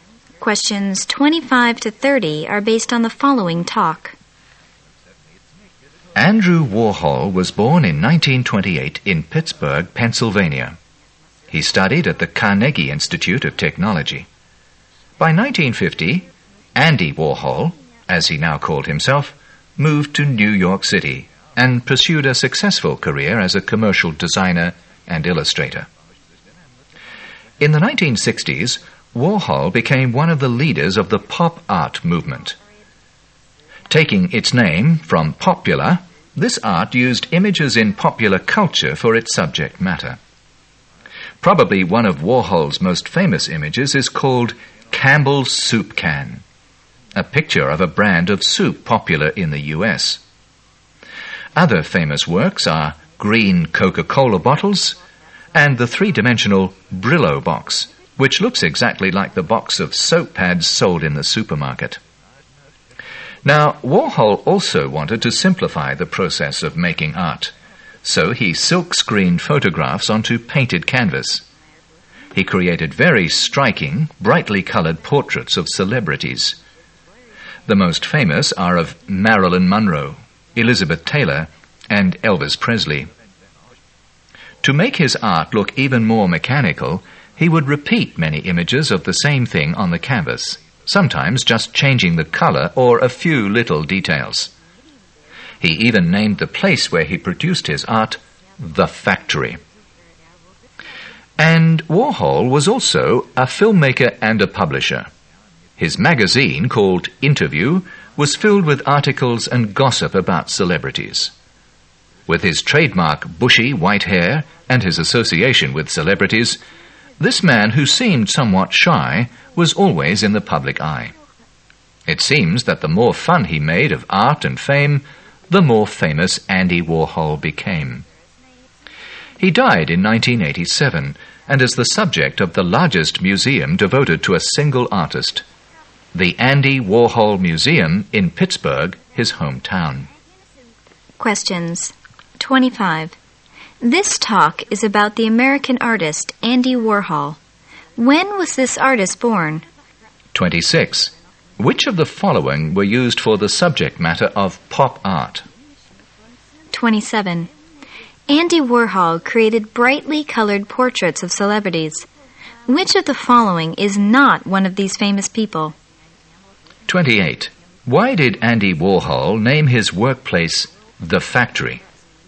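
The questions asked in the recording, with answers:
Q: When was this artist born?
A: 1928

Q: Which of the following were used for the subject matter of pop art?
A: Images in popular culture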